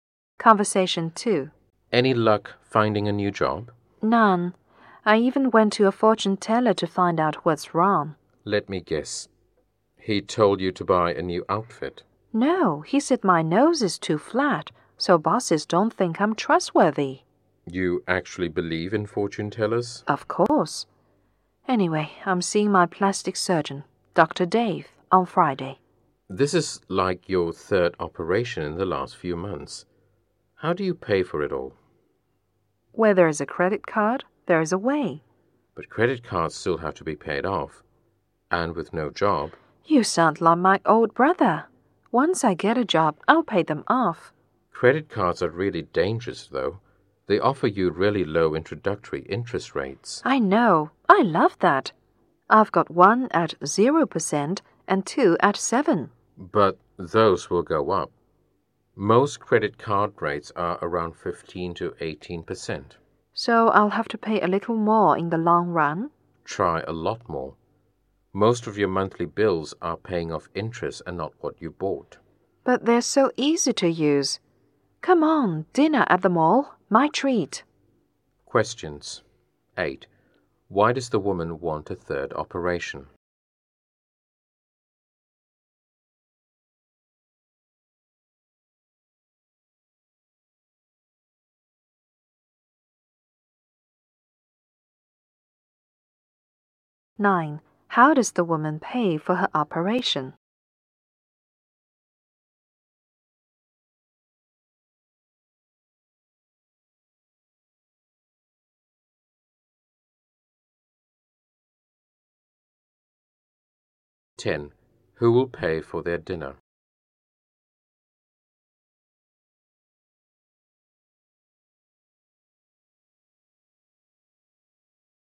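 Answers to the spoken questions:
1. A fortune teller said her nose is too flat for bosses to trust her
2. With credit cards
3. The woman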